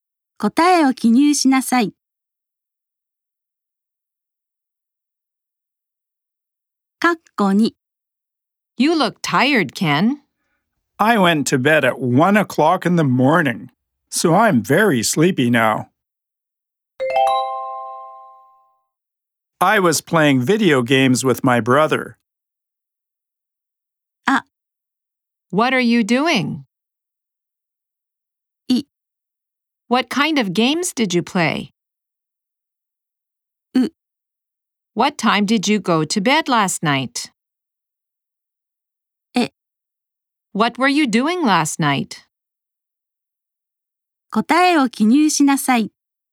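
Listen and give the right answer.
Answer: え: What were you doing last night?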